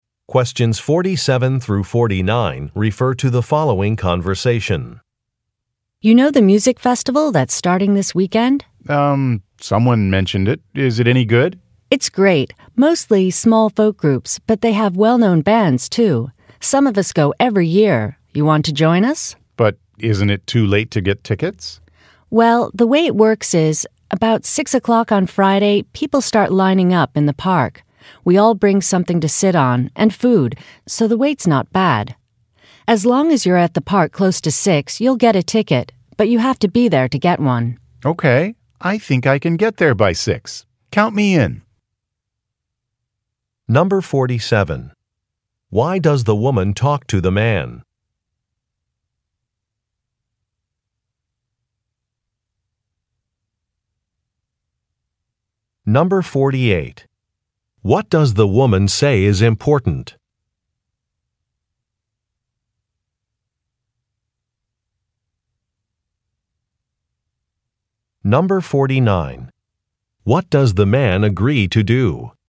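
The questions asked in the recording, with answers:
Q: Why does the woman talk to the man?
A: To invite him to go to a music festival with her group

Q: What does the woman say is important?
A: Being at the park close to 6 o'clock on Friday to get a ticket

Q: What does the man agree to do?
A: Join them at the festival by getting to the park by 6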